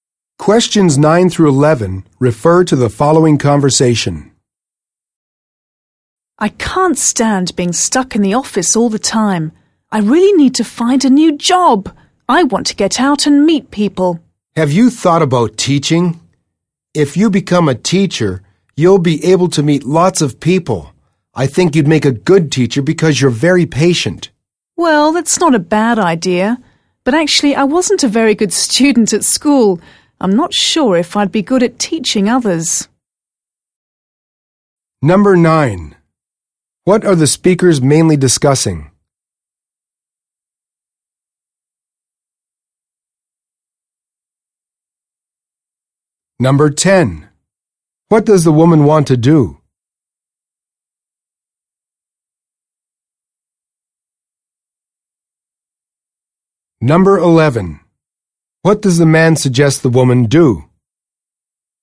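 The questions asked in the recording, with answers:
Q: What are the speakers mainly discussing?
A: Finding a new job for the woman

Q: What does the woman want to do?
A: Get out and meet people

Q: What does the man suggest the woman do?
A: Become a teacher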